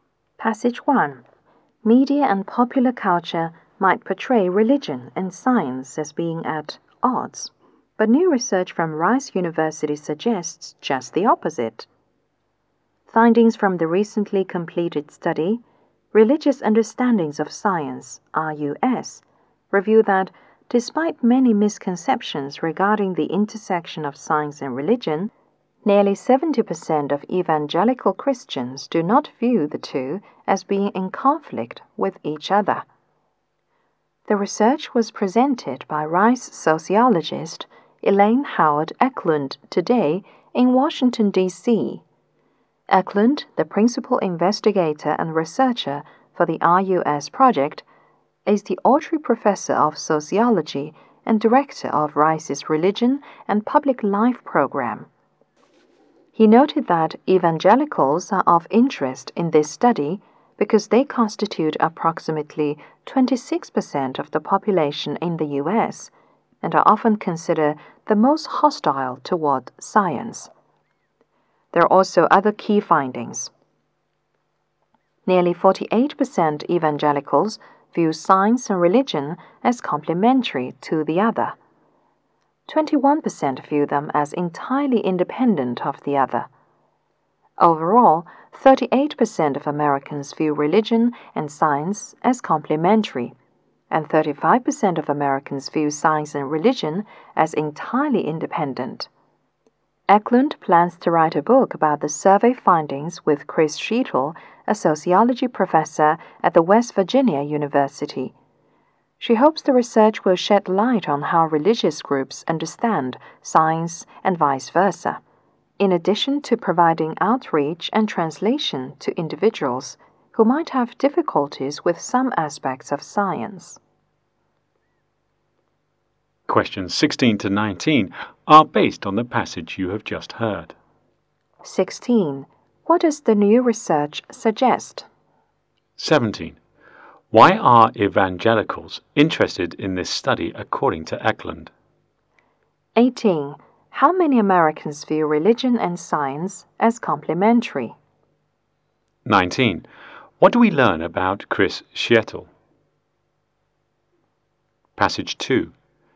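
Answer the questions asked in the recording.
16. Religion and science are not in conflict
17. They are about 26% of the US population and often considered the most hostile toward science
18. 38%
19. He is a sociology professor at West Virginia University who will co-write the book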